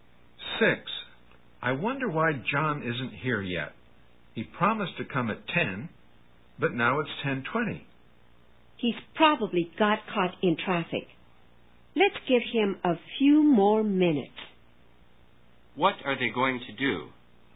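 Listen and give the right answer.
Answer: Wait a few more minutes for John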